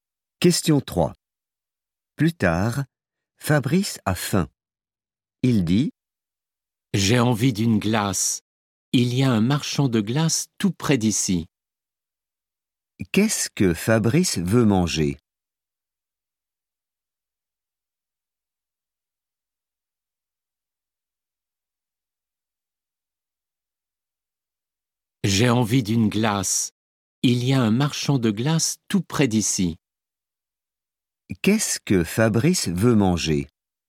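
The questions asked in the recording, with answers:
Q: Qu'est-ce que Fabrice veut manger?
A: une glace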